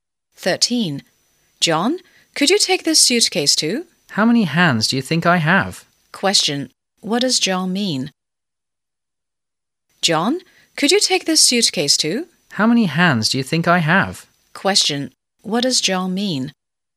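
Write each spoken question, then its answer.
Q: Question. What does John mean?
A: He can't carry any more; his hands are full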